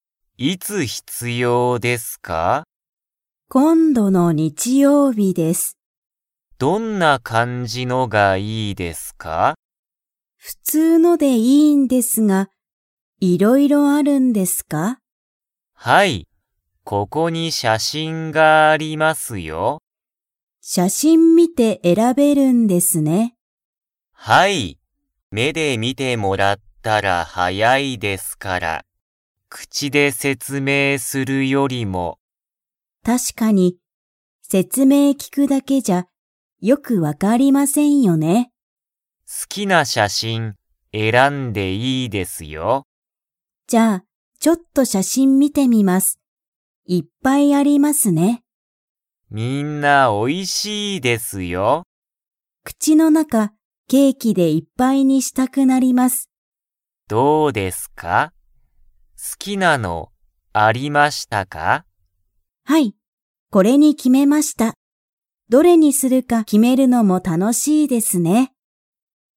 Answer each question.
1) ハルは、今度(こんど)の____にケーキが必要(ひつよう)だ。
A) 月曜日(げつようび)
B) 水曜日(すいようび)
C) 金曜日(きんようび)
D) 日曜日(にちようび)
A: D) 日曜日(にちようび)

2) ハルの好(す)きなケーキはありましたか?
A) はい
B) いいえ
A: A) はい

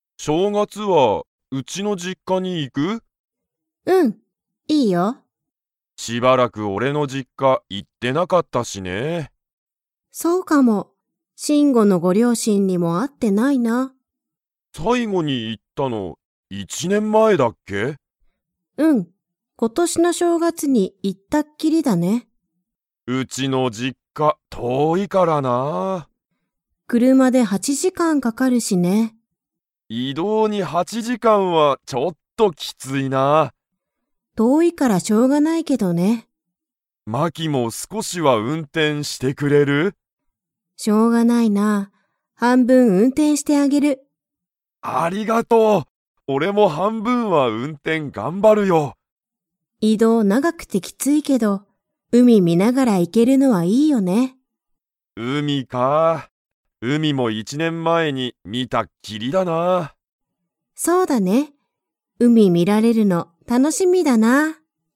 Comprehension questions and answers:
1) シンゴの実家じっかには 。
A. よく行いってる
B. しばらく行いってない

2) マキは、どのくらい運転うんてんしますか?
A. ちょっと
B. 半分はんぶん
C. 全部ぜんぶ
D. 全まったく運転うんてんしない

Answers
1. B. しばらく行いってない
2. B. 半分はんぶん

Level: Level 4

